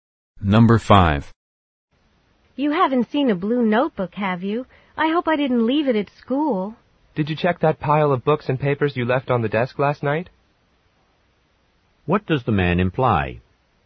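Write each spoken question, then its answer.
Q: What does the man imply?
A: The notebook may be in the pile of books and papers on the desk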